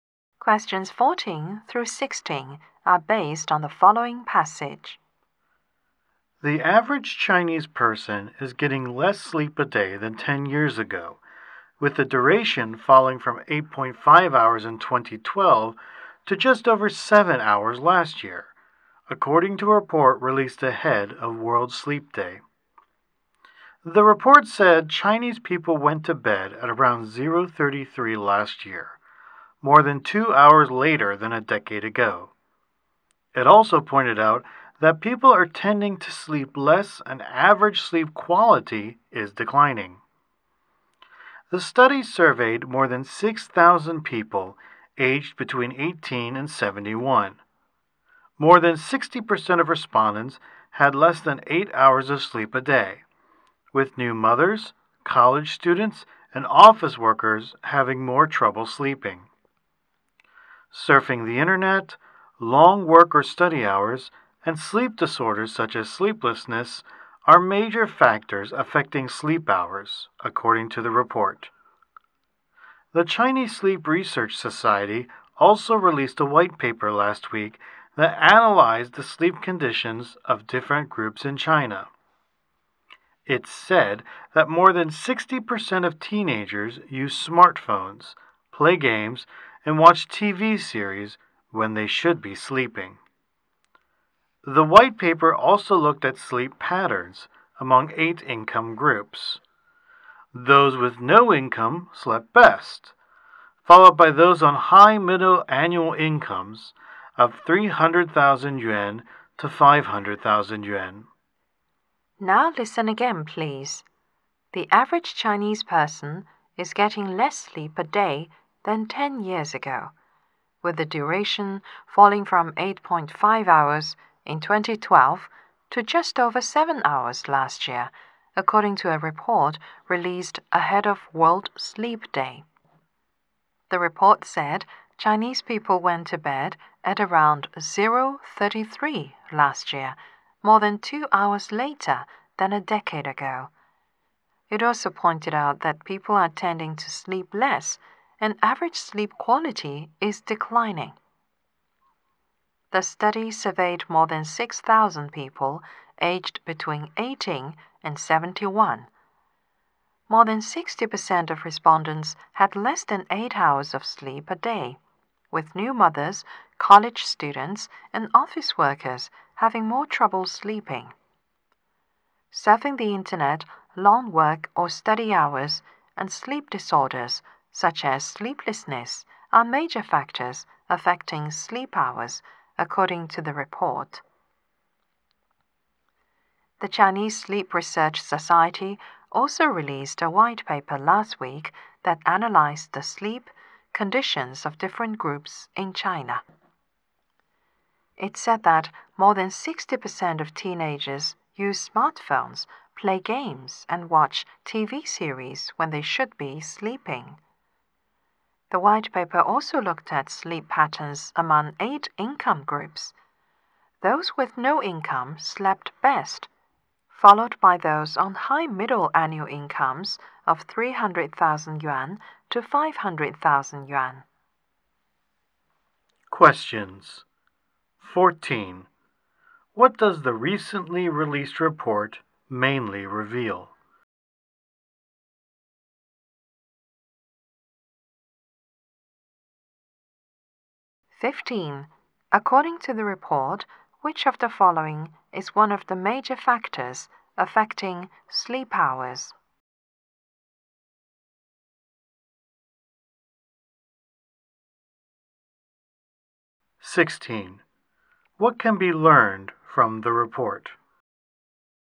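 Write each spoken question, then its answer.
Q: What does the recently released report mainly reveal?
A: Chinese people are sleeping less than 10 years ago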